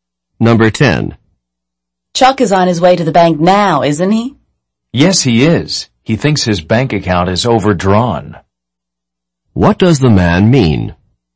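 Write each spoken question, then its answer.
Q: What does the man mean?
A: Chuck is going to the bank because he thinks his account is overdrawn.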